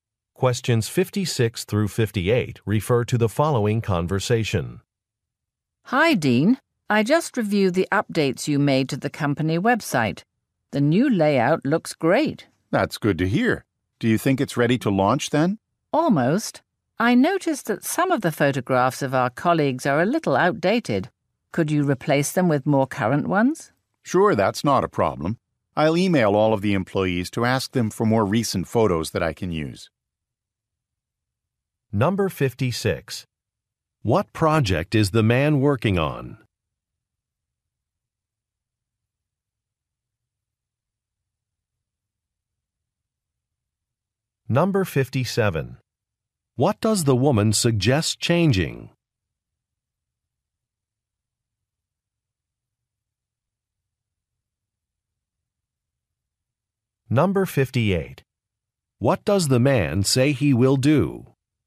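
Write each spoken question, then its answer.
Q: What project is the man working on?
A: Updating the company website

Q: What does the woman suggest changing?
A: The outdated employee photographs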